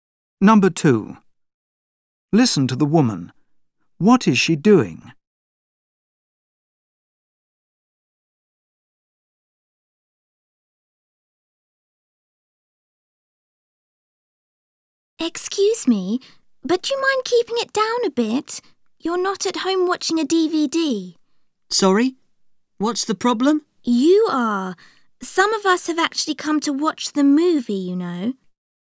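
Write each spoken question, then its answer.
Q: What is she doing?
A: Complaining about noise in a cinema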